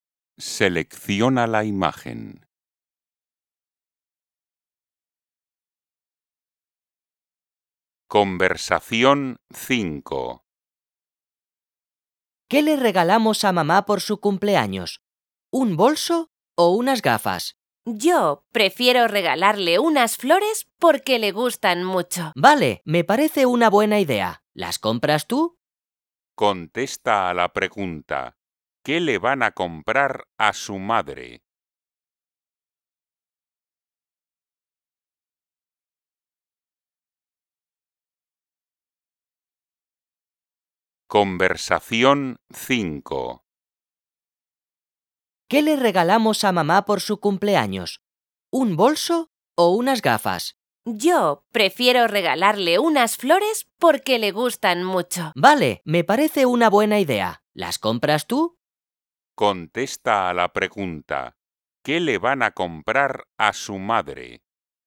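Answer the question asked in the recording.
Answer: unas flores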